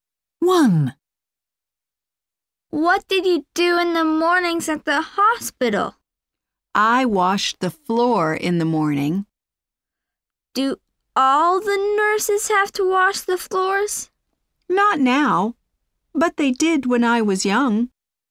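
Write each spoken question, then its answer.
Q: What did you do in the mornings at the hospital?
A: washed the floor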